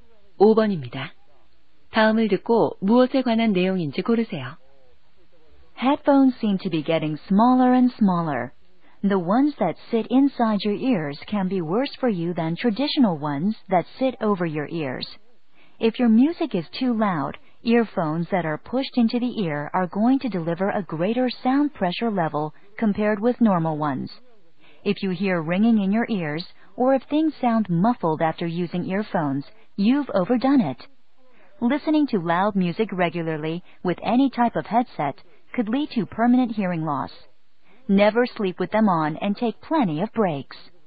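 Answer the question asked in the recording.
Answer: 이어폰 사용 시 청력 손상 주의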